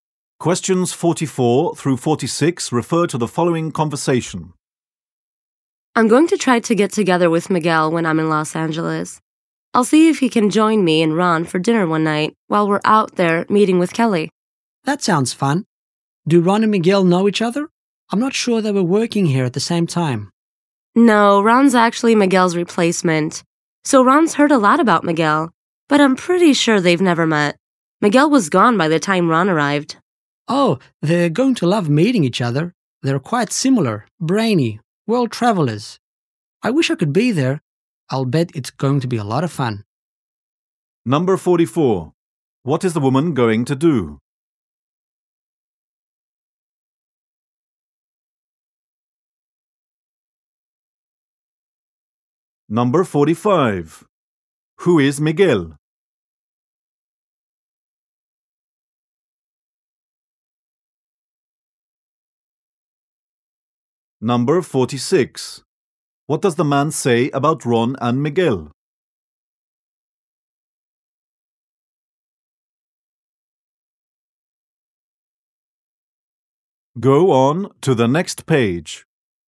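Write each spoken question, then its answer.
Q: Who is Miguel?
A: A former employee whom Ron replaced.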